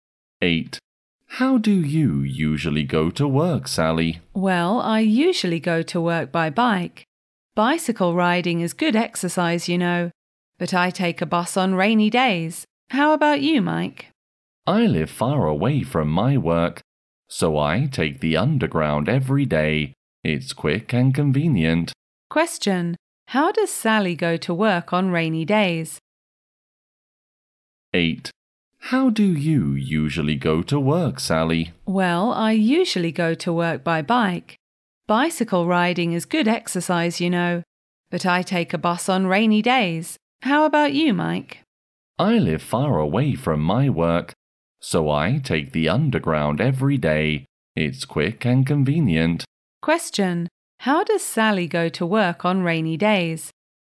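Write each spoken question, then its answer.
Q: How does Sally go to work on rainy days?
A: By bus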